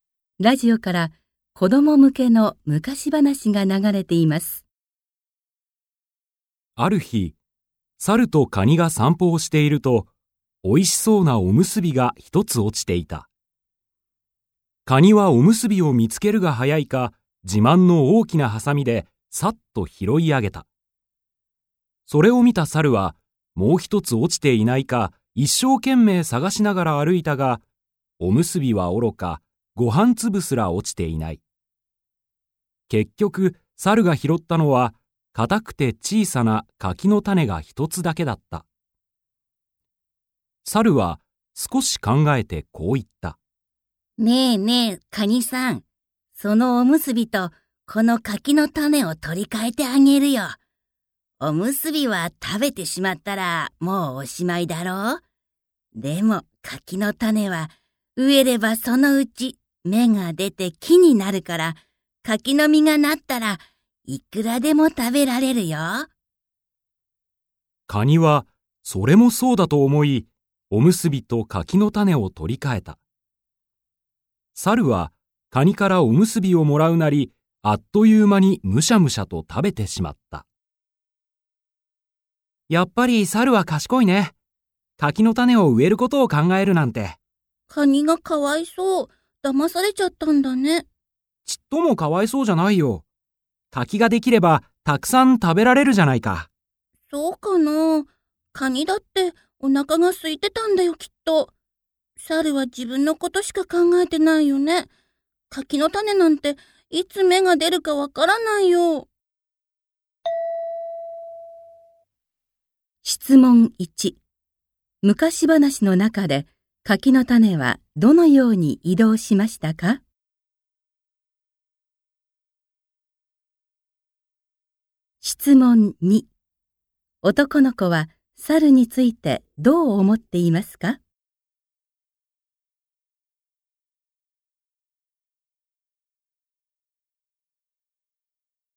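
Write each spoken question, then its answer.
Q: 昔話の中で柿の種はどのように移動しましたか?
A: 猿が拾って、おむすびと取り替えてカニに渡した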